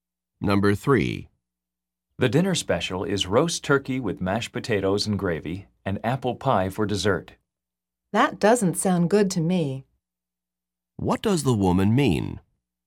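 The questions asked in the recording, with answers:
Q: What does the woman mean?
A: She doesn't want the dinner special.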